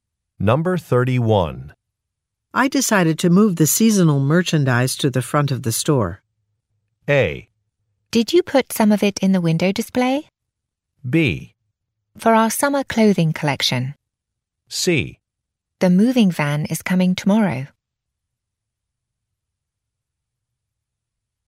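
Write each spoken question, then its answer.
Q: I decided to move the seasonal merchandise to the front of the store.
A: A: Did you put some of it in the window display?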